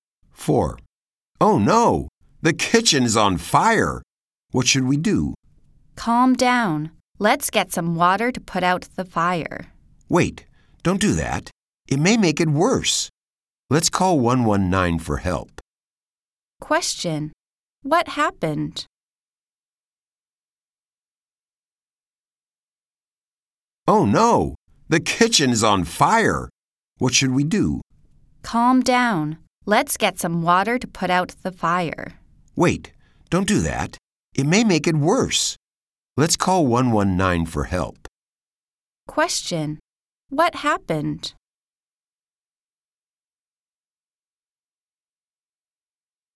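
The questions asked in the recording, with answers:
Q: What happened?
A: The kitchen caught fire.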